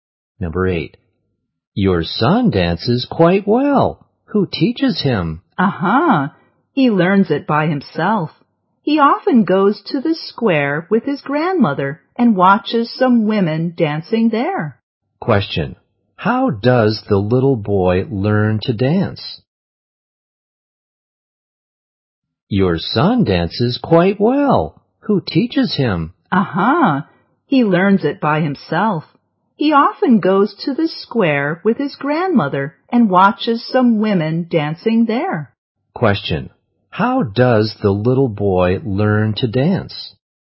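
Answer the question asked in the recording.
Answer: By himself, watching women dancing in the square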